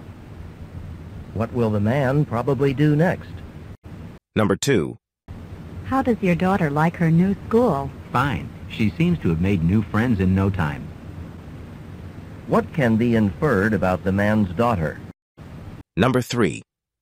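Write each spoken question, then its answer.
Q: What can be inferred about the man's daughter?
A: She made new friends quickly and likes her new school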